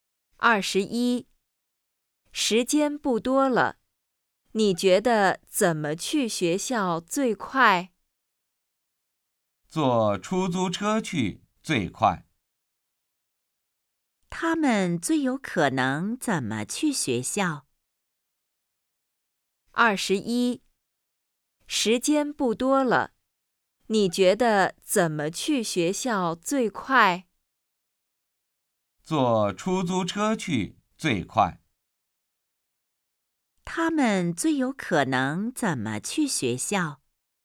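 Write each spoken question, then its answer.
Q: 他们最有可能怎么去学校?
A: 坐出租车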